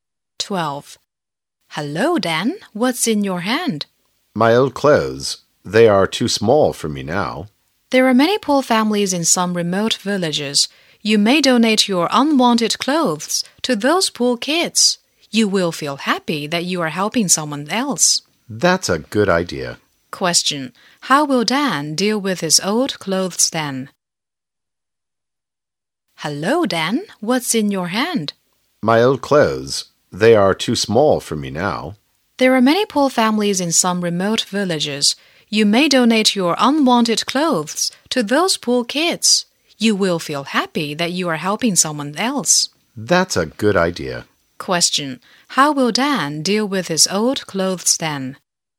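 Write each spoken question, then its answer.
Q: How will Dan deal with his old clothes then?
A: Donate them to poor kids in remote villages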